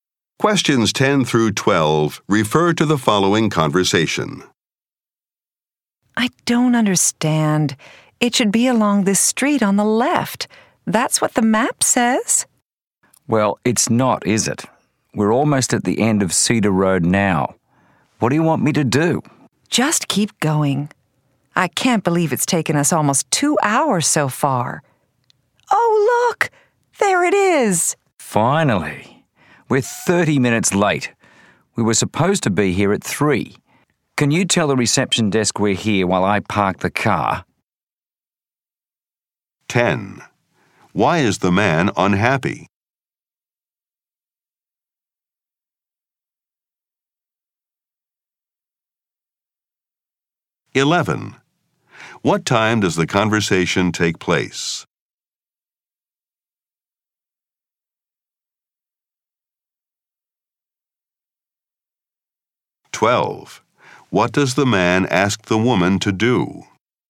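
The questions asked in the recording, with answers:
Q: What time does the conversation take place?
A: 3:30

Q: What does the man ask the woman to do?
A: Tell the reception desk they have arrived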